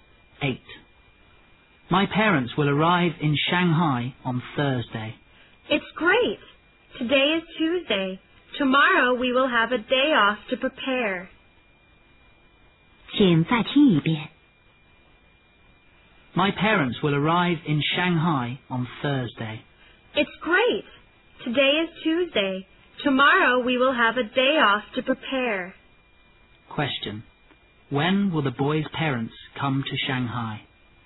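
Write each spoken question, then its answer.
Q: When will the boy's parents come to Shanghai?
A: On Thursday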